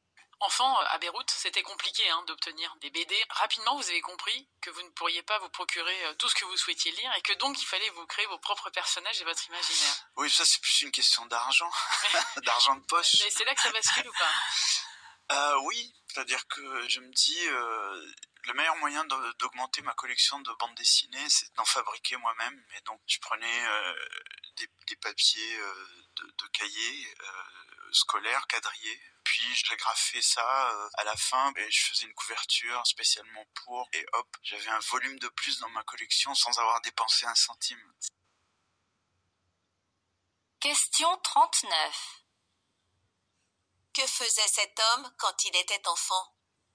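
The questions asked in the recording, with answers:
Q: Que faisait cet homme quand il était enfant?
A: Il fabriquait lui-même ses propres bandes dessinées.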